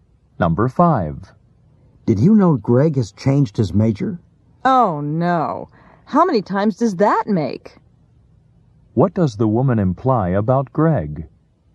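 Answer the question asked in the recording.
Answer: Greg has changed his major many times.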